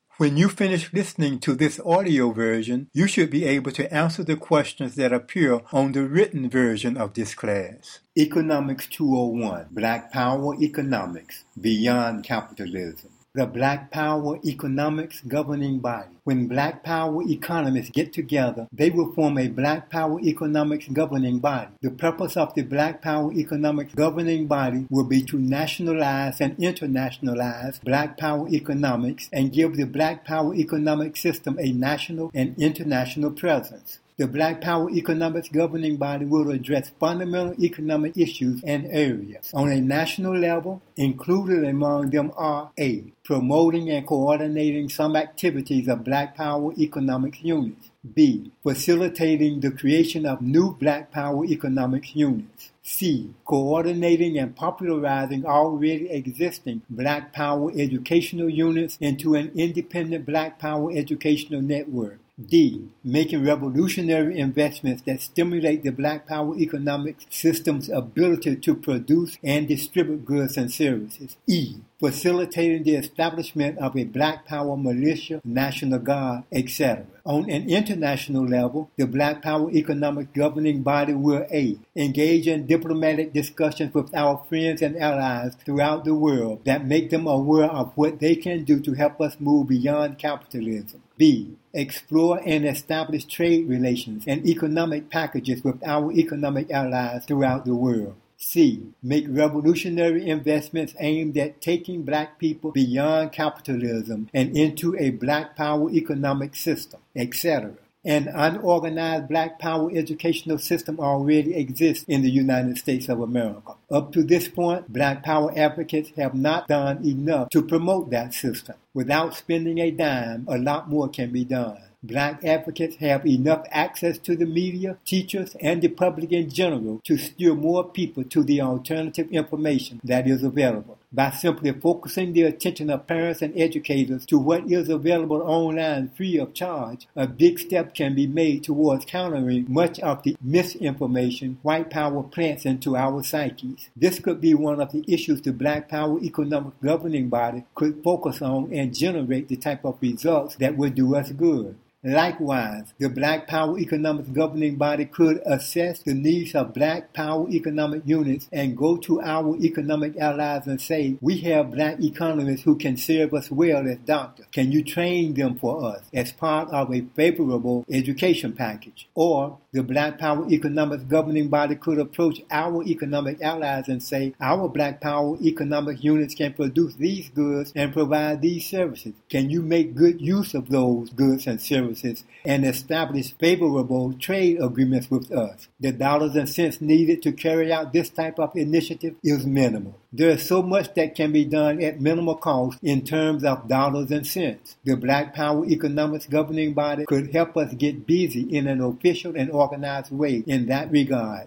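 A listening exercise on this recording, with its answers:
Read the essay below. Afterwards, try to get the best understanding you can of the following questions.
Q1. What will be the functions of a Black Power Economics Governing Body?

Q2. Is it important the the Black Power Economics system be national and international in scope?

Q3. Why can an independent Black Power educational system be organized at little or no cost?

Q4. Why is it important that We establish diplomatic relations with Our allies in an official capacity?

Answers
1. To nationalize and internationalize Black Power economics: coordinate and create economic units, build an independent educational network, make revolutionary investments, set up a militia, and build diplomatic and trade relations with allies
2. Yes; the Governing Body's purpose is to give the system a national and international presence
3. An unorganized system already exists, and advocates have access to the media, teachers and the public to steer people to free online information
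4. So allies know how they can help us move beyond capitalism, e.g. through education packages and favorable trade agreements

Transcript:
Class #7: The Black Power Economics Governing Body [
Audio Version]
When Black Power Economists get together, they will form a Black Power Economics Governing Body. The purpose of the Black Power Economics Governing Body will be to nationalize and internationalize Black Power Economics and give the Black Power Economics system a national and international presence. The Black Power Economics Governing Body will address fundamental economic issues and areas. On a national level, included among these are:
(A) promoting and coordinating some activities of Black Power Economics Units;
(B) facilitating the creation of new Black Power Economics Units;
(C) coordinating and popularizing already existing Black Power educational units into an independent Black Power educational network;
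(D) making revolutionary investments that stimulate the Black Power Economics system's ability to produce and distribute goods and services;
(E) facilitating the establishment of a Black Power militia / national guard; etc.
(A) engage in diplomatic discussions with Our friends and allies throughout the world that make them aware of what they can do to help Us move beyond capitalism;
(B) explore and establish trade relations and economic packages with Our economic allies throughout the world;
(C) make revolutionary investments aimed at taking Black People beyond capitalism and into a Black Power Economics system; etc.
An unorganized Black Power educational system already exists in the United States of America. Up to this point, Black Power advocates have not done enough to promote that system. Without spending a dime, a lot more can be done. Black Power advocates have enough access to the media, teachers and the public in general to steer more people to the alternative information that is available. 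By simply focussing the attention of parents and educators to what is available online free of charge, a big step can be made toward countering much of the misinformation white power plants into Our psyches. This could be one of the issues the Black Power Economics Governing Body could focus on and generate the type of results that will do Us good.
Likewise, the Black Power Economics Governing Body could assess the needs of Black Power Economic Units and go to Our economic allies and say, "We have Black Economists who can serve Us well as doctors. Can you train them for Us as part of a favorable education package?" Or, the Black Power Economics Governing Body could approach Our economic allies and say, "Our Black Power Economics Units can produce these goods and provide these services. Can you make good use of those goods and services and establish favorable trade agreements with Us?" The dollars and cents needed to carry out this type of initiative is minimal.
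There is so much that can be done at minimal cost in terms of dollars and cents. The Black Power Economics Governing Body could help Us get busy in an official and organized way in that regard.

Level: Economics 201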